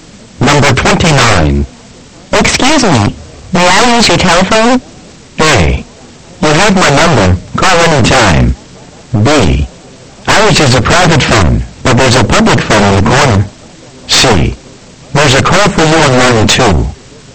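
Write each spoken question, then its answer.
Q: Excuse me, may I use your telephone?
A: B: Ours is a private phone, but there's a public phone in the corner.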